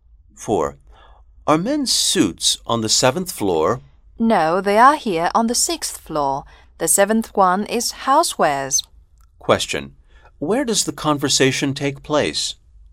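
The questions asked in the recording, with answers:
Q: Where does the conversation take place?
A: In a department store, on the 6th floor (men's suits)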